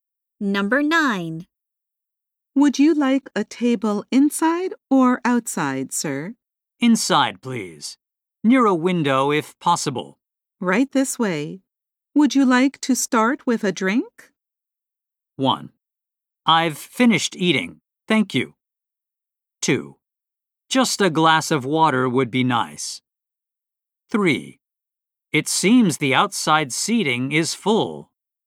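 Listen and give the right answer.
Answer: 2: Just a glass of water would be nice.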